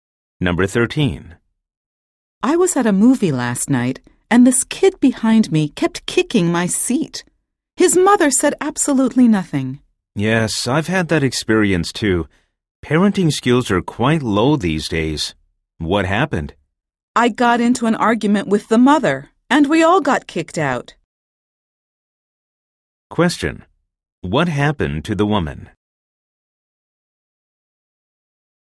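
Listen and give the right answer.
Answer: She was kicked out of the movie theater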